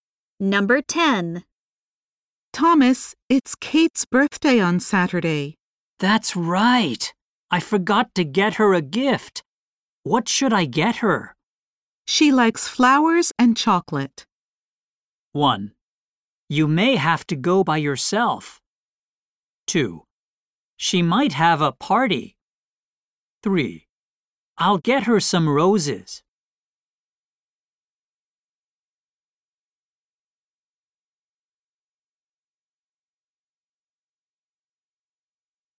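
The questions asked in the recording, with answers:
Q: She likes flowers and chocolate.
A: 3: I'll get her some roses.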